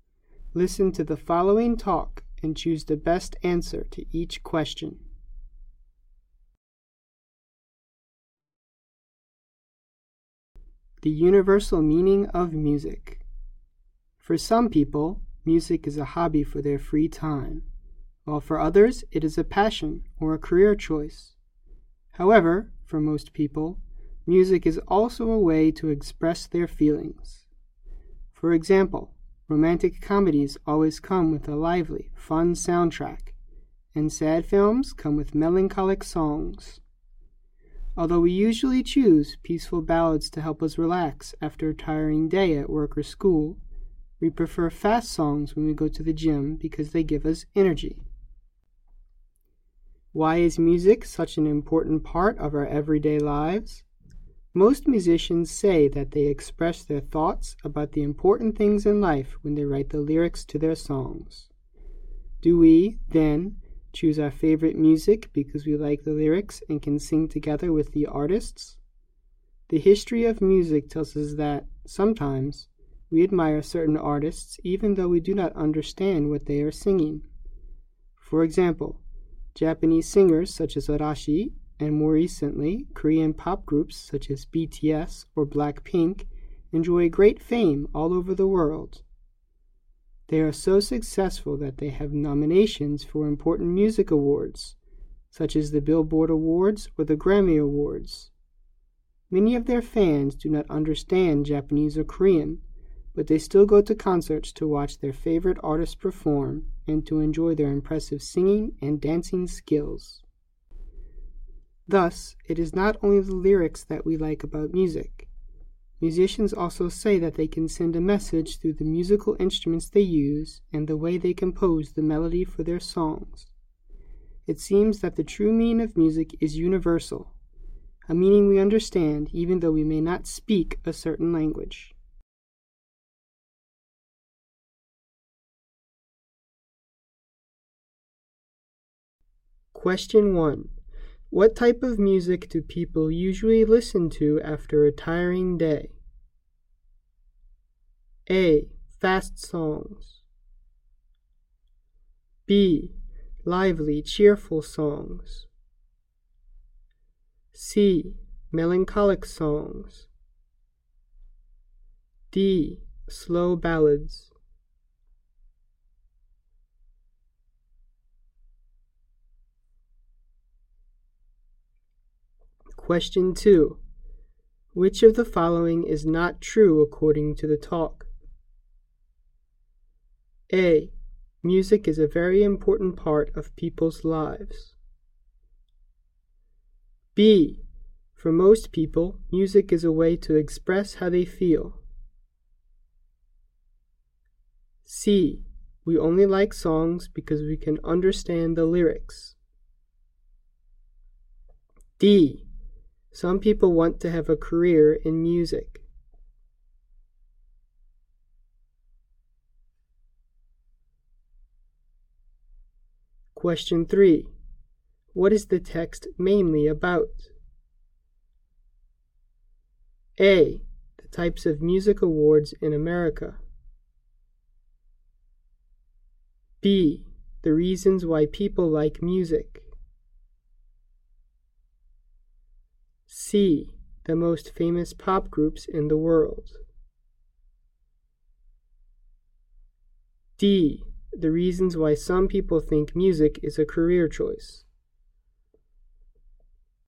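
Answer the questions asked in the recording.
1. D: Slow ballads.
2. C: We only like songs because we can understand the lyrics.
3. B: The reasons why people like music.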